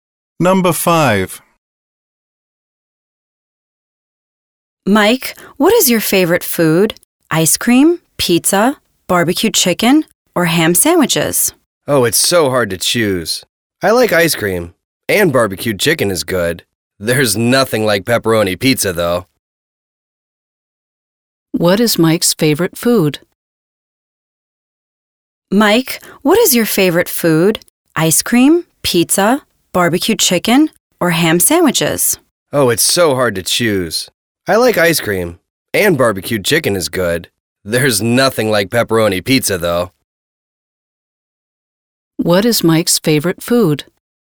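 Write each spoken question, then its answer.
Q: What is Mike's favorite food?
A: Pizza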